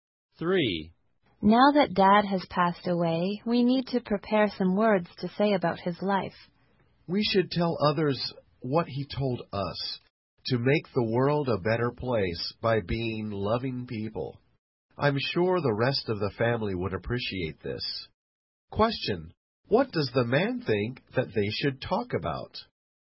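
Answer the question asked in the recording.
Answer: Dad's message: make the world better by being loving people.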